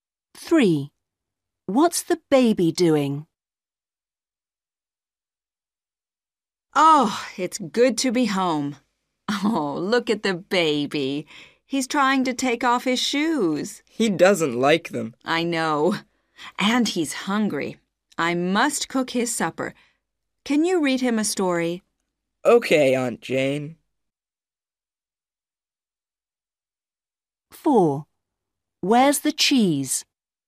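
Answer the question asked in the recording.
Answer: trying to take off his shoes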